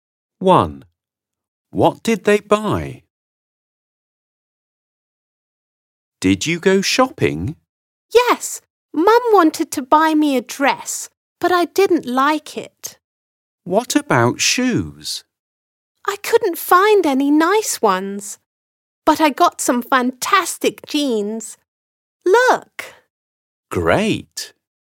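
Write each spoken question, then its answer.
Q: What did they buy?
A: jeans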